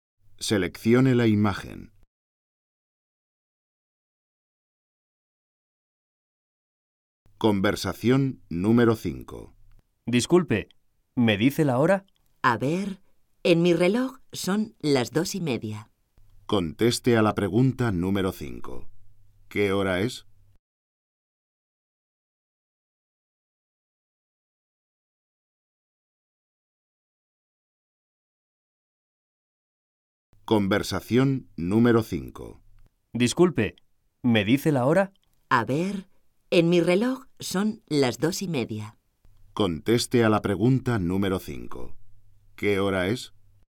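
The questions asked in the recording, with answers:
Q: ¿Qué hora es?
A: Las 2:30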